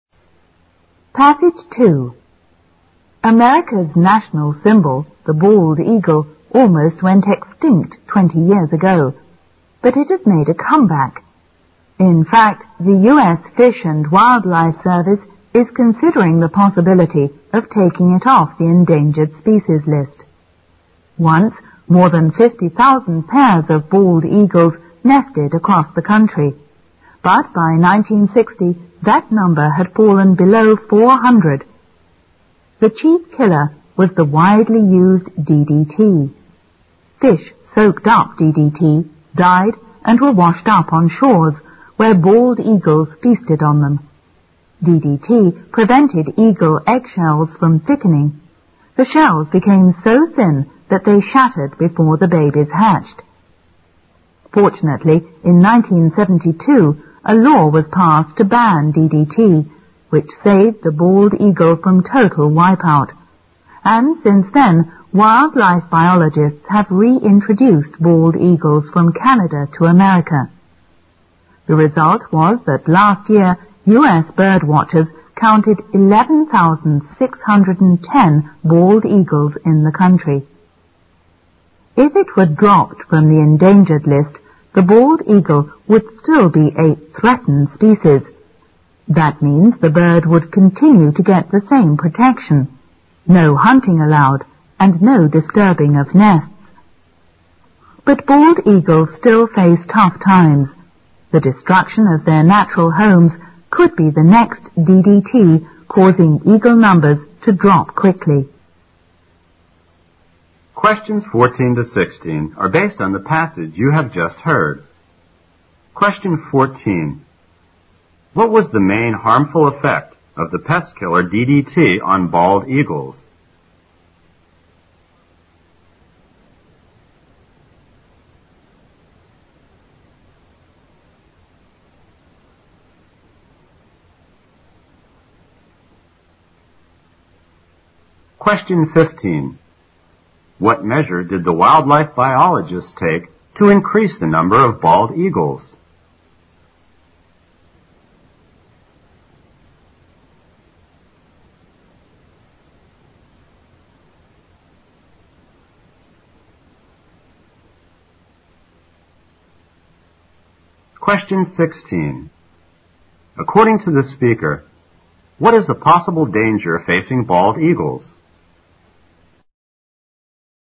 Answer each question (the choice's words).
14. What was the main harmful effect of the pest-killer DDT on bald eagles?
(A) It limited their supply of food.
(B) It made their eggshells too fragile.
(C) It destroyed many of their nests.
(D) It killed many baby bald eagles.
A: It made their eggshells too fragile.

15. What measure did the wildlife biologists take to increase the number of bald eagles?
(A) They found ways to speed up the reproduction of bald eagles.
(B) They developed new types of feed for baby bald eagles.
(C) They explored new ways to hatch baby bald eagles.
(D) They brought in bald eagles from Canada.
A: They brought in bald eagles from Canada.

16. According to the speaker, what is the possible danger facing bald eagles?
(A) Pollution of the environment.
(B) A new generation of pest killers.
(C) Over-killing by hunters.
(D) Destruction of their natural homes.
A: Destruction of their natural homes.

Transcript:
America's National Symbol – the Bald Eagle almost went extinct 20 years ago. But it has made a comeback. In fact, the US Fishing and Wildlife Service is considering the possibility of taking it off the endangered species list. Once, more than 50,000 pairs of bald eagles nested across the country. But by 1960, that number had fallen below 400. The chief killer was the widely used DDT. Fish soaked up DDT died and were washed up on shores where bald eagles feasted on them. DDT prevented eagle eggshells from thickening. The shell became so thin that they shattered before the babies hatched(14). Fortunately in 1972, a law was passed to ban DDT, which saved the bald eagle from total wipeout. And since then wildlife biologists have reintroduced bald eagles from Canada to America(15). The result was that last year US bird watchers counted 11,610 bald eagles in the country. If it were dropped from the endangered list, the bald eagles would still be a threatened species. That means the bird would continue to get the same protection. No hunting allowed, and no disturbing of nests. But bald eagles still face tough times. The destruction of their natural homes could be the next DDT causing eagle numbers to drop quickly(16).

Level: 六级